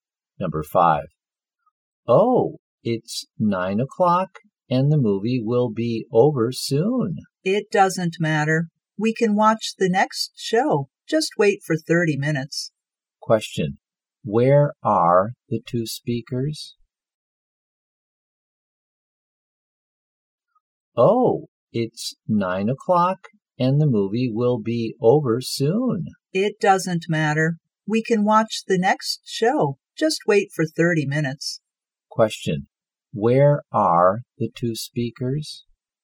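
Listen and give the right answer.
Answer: At the cinema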